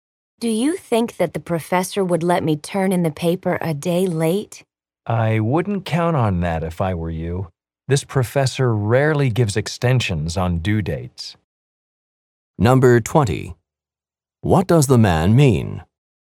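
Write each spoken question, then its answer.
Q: What does the man mean?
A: The professor probably won't accept the paper late.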